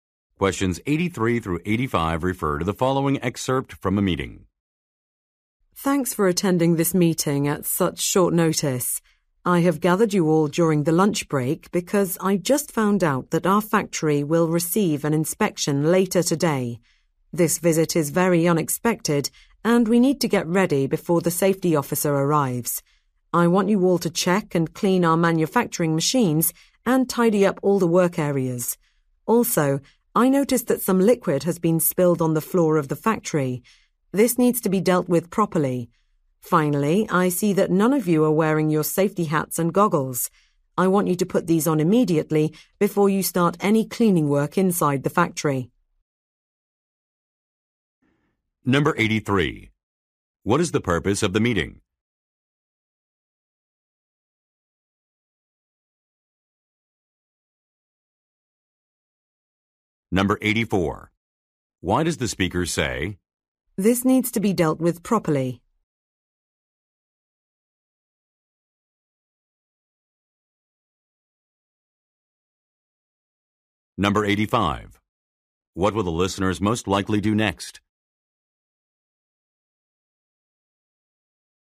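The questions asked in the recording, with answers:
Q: What is the purpose of the meeting?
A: To prepare for an unexpected safety inspection

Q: What will the listeners most likely do next?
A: Put on their safety hats and goggles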